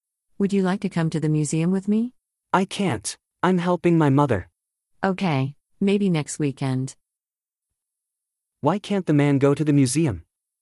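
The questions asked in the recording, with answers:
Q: Why can't the man go to the museum?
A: He's helping his mother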